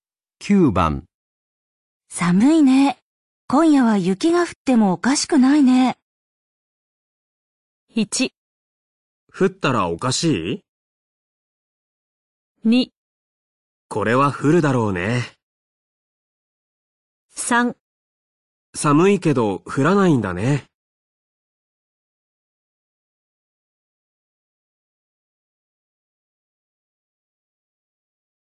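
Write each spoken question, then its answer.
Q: 寒いね。今夜は雪が降ってもおかしくないね。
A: 2: これは降るだろうね。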